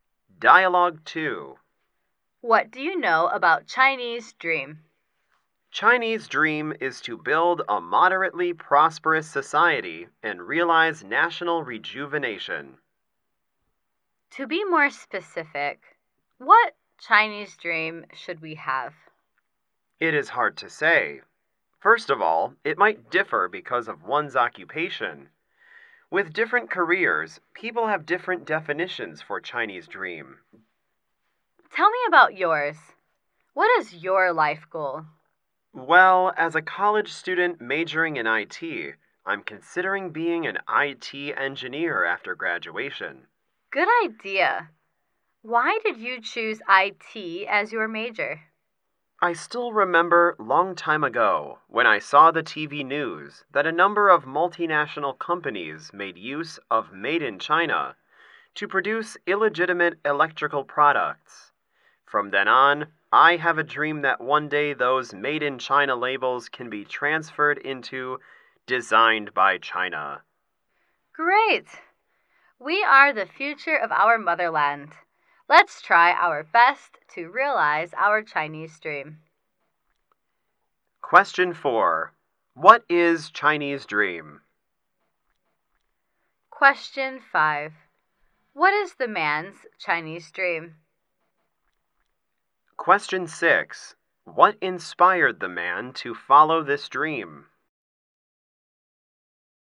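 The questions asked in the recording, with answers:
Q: What is Chinese dream?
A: To build a moderately prosperous society and realize national rejuvenation

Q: What inspired the man to follow this dream?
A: TV news that multinational companies used Made in China to produce illegitimate electrical products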